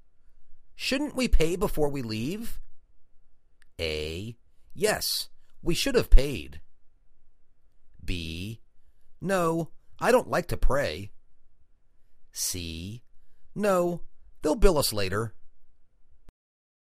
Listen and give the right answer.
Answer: No, they'll bill us later.